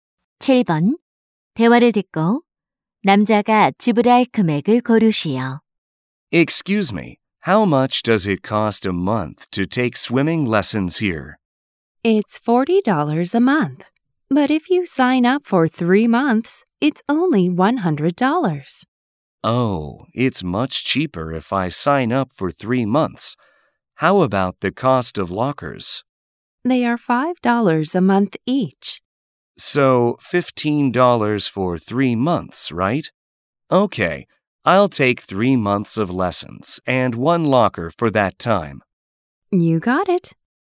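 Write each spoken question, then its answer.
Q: 대화를 듣고 남자가 지불할 금액을 고르시오.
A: 115달러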